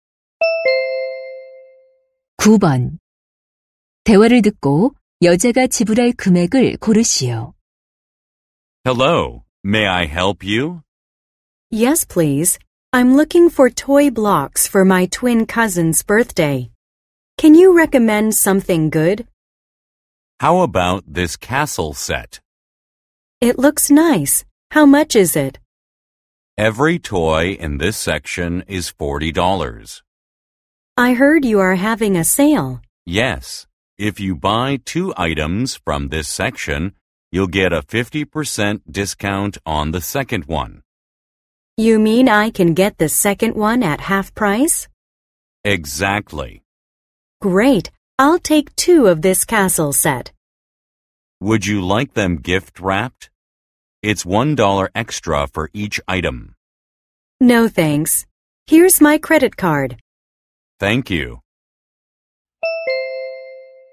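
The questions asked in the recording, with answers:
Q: 대화를 듣고 여자가 지불할 금액을 고르시오.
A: $60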